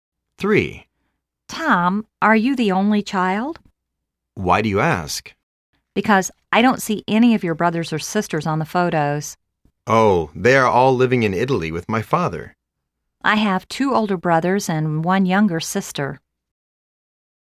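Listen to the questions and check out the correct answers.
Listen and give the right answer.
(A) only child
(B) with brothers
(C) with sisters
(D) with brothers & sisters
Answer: (D) with brothers & sisters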